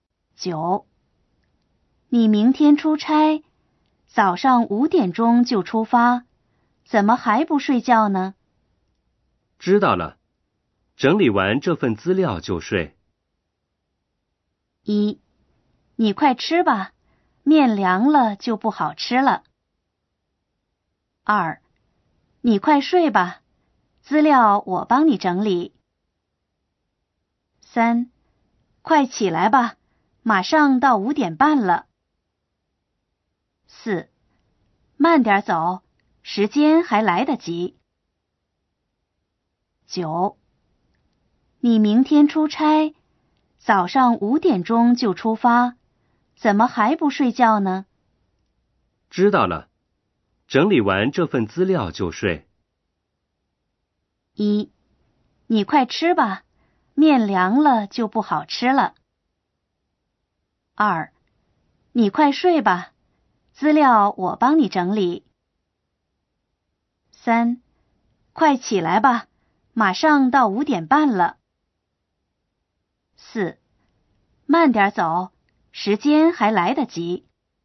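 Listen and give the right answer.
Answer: 二: 你快睡吧,资料我帮你整理。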